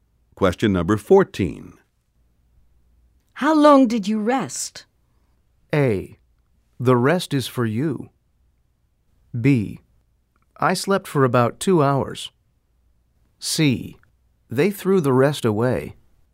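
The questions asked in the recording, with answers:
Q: How long did you rest?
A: B: I slept for about 2 hours.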